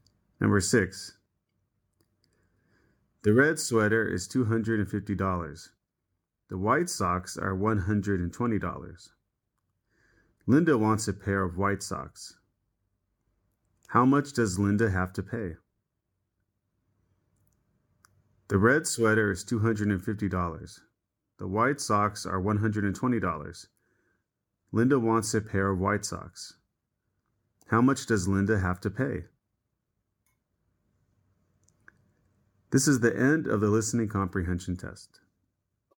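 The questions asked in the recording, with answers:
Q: How much does Linda have to pay?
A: $120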